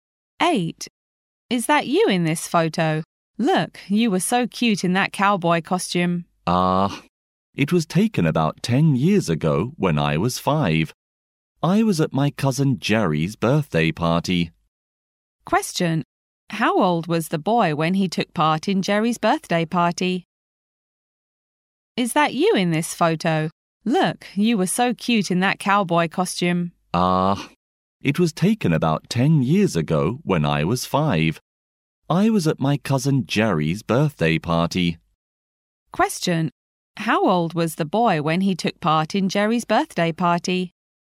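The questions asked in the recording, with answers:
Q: How old was the boy when he took part in Jerry's birthday party?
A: 5 years old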